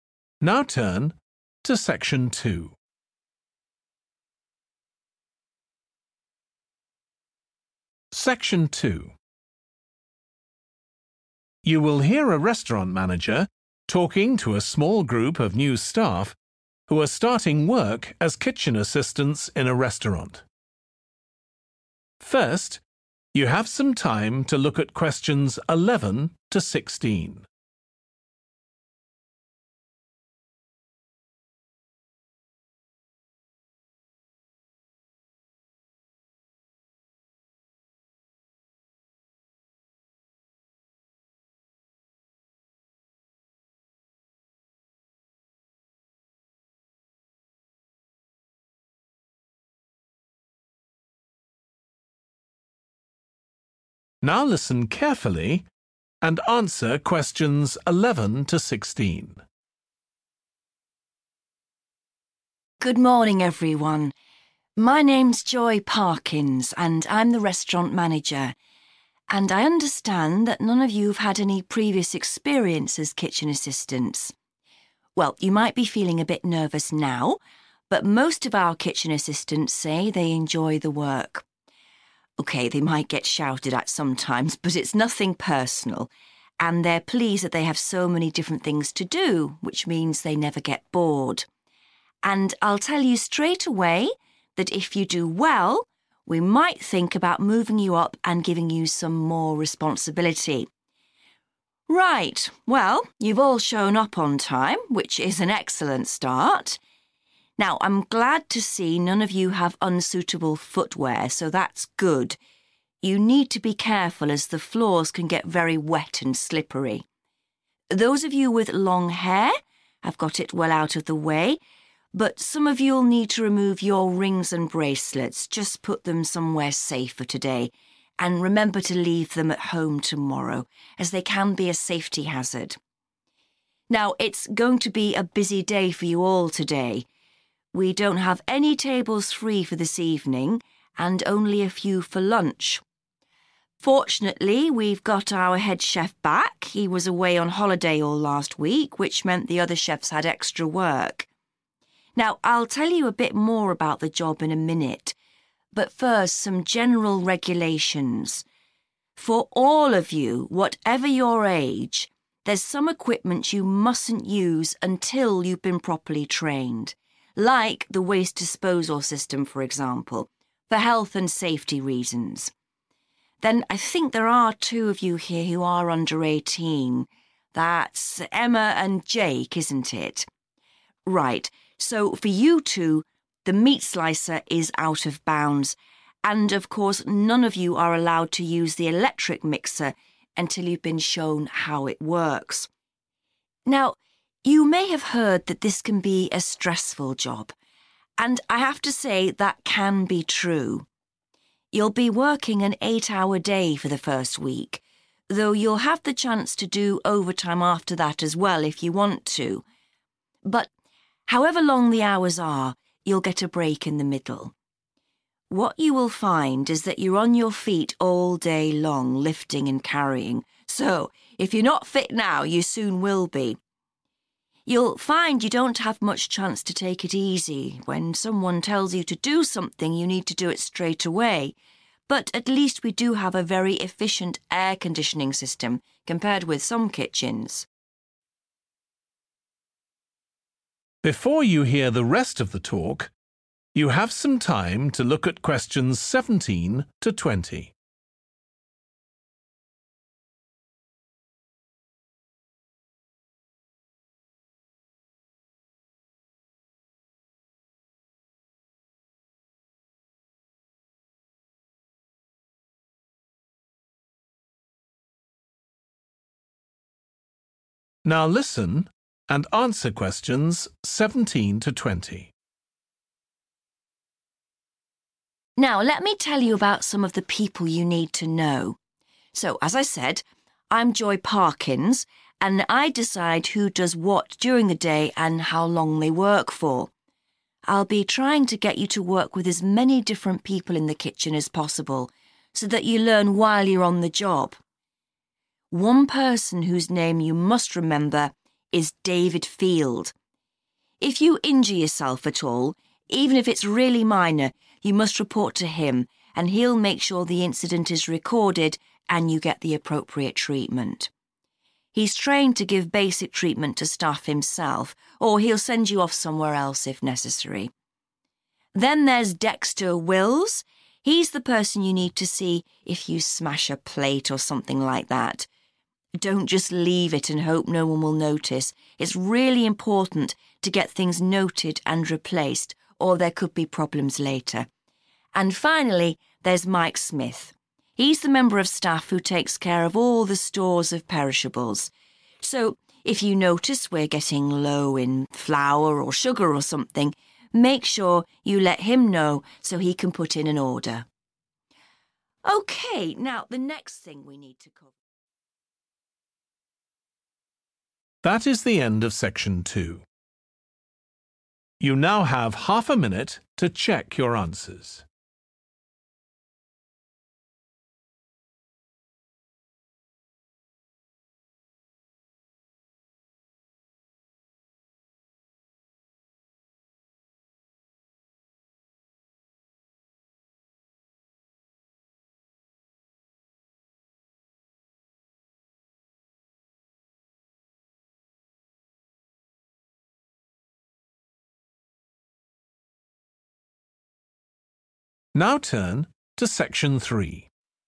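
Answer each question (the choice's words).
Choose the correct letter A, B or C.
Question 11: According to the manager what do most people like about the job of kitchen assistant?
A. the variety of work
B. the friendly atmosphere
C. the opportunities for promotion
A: the variety of work

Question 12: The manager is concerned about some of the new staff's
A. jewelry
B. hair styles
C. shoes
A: jewelry

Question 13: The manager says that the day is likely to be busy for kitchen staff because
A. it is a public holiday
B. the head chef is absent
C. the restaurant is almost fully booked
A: the restaurant is almost fully booked

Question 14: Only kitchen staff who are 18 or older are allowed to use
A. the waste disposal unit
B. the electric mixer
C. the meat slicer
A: the meat slicer

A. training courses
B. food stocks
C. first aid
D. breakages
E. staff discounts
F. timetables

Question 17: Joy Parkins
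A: timetables

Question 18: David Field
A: first aid

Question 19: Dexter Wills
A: breakages

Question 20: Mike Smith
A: food stocks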